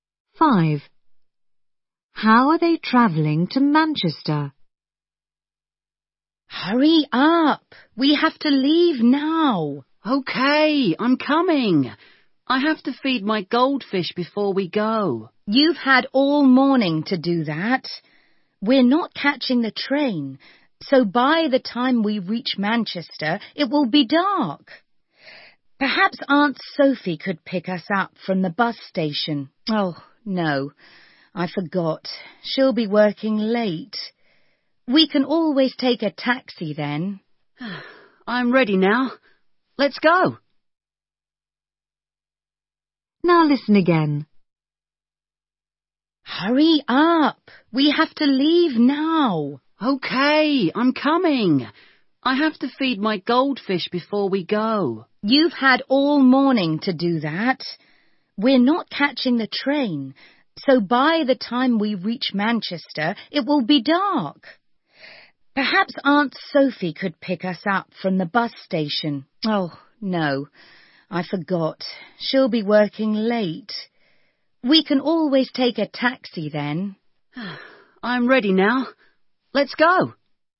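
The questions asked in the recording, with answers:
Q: How are they travelling to Manchester?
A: By bus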